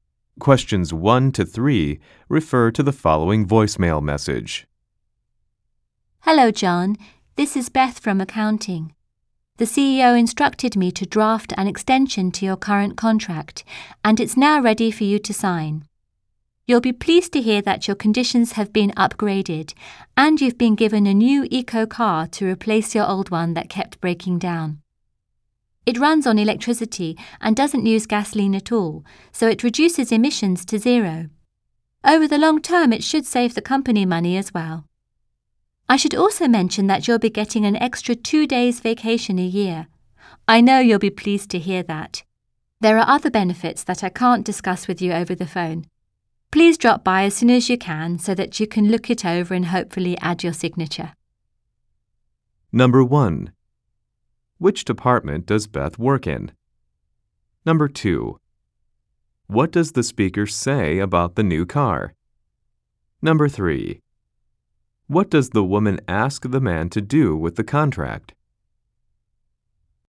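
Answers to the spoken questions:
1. Accounting
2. It runs on electricity and produces zero emissions
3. Come by to look it over and sign it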